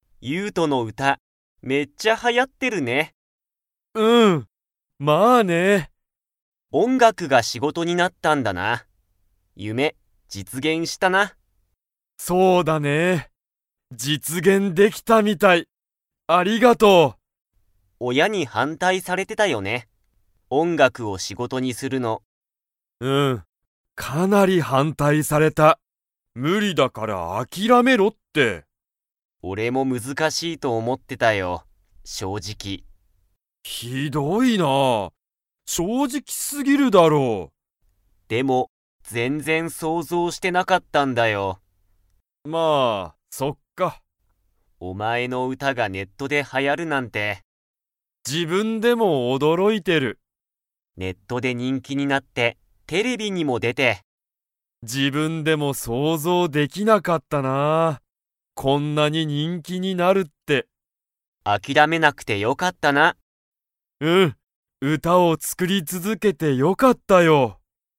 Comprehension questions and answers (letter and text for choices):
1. ユウトは、音楽おんがくを仕事しごとにするのを に反対はんたいされてた。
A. 先生せんせい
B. タケオ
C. ネット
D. 親おや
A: D. 親おや

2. ユウトはテレビに出でましたか?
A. はい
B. いいえ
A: A. はい

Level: Level 4